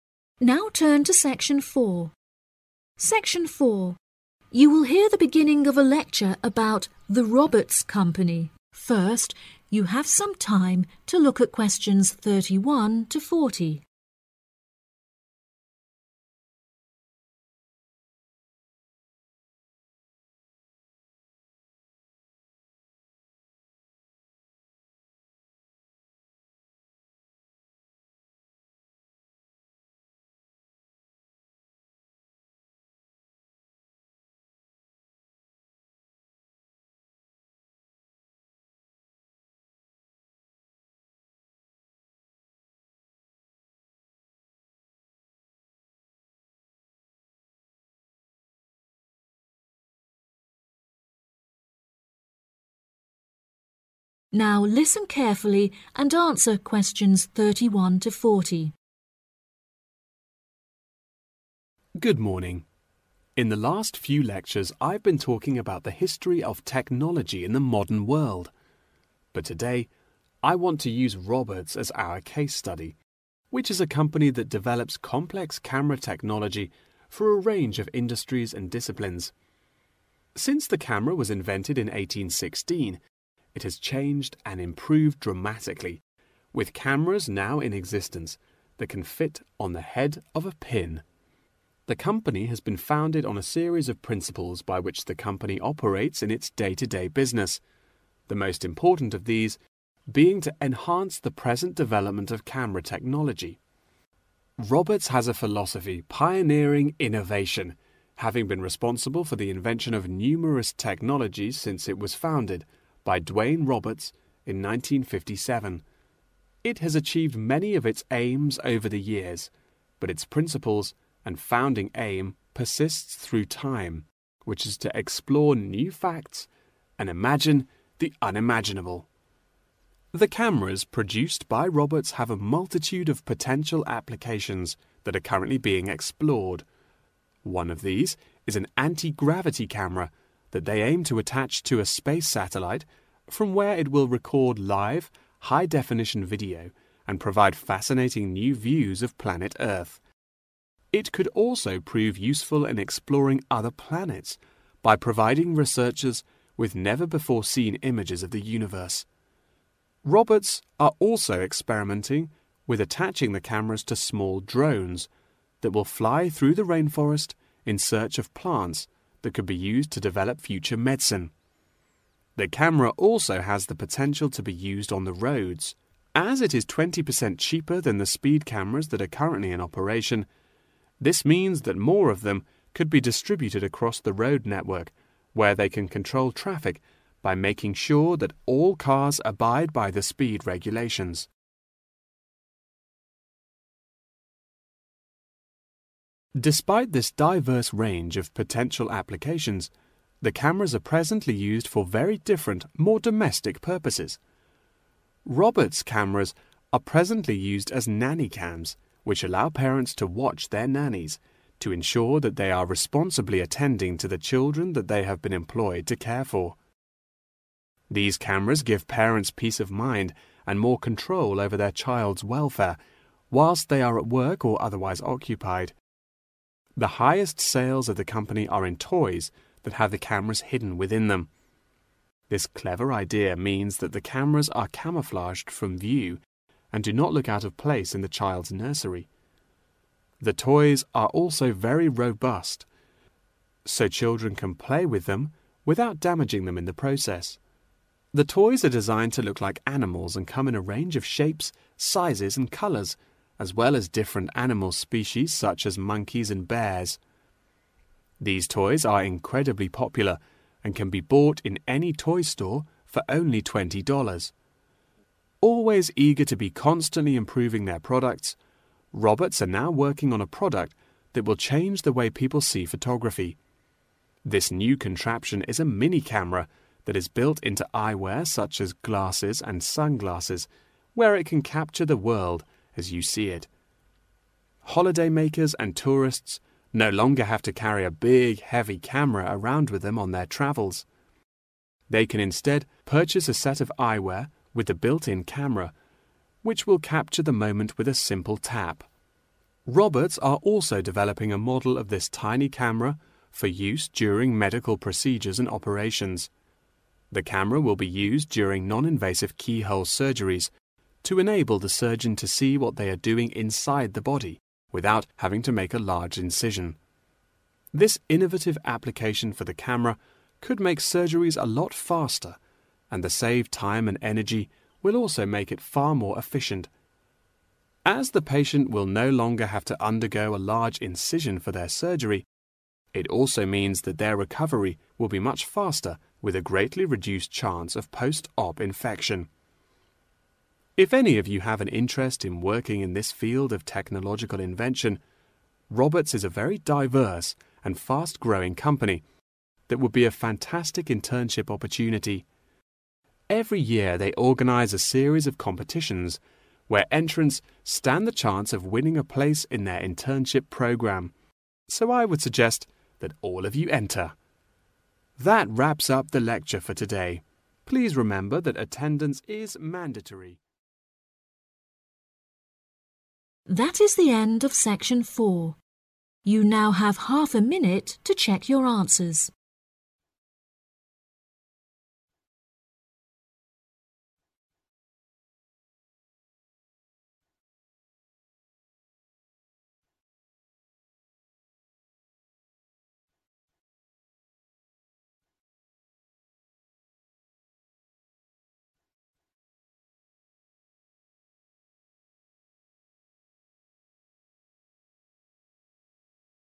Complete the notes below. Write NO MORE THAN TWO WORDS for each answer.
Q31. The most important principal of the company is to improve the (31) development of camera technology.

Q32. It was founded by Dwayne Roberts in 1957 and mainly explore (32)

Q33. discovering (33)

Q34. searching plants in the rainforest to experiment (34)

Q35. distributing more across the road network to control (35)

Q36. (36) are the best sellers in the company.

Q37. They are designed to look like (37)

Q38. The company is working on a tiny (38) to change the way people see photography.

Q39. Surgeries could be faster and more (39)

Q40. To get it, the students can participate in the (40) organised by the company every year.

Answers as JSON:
{"31": "present", "32": "new facts", "33": "other planets", "34": "future medicine", "35": "traffic", "36": "toys", "37": "animals", "38": "camera", "39": "efficient", "40": "competitions"}